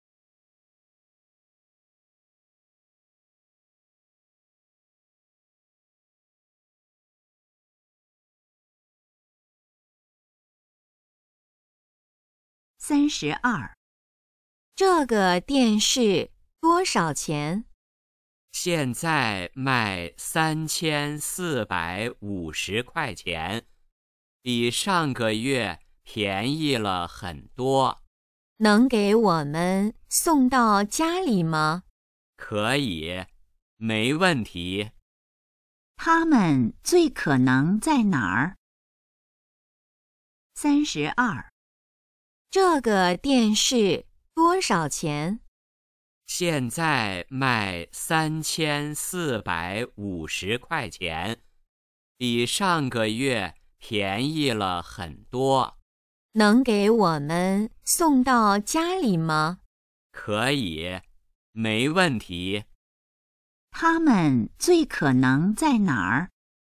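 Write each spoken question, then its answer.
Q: 他们最可能在哪儿?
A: 商店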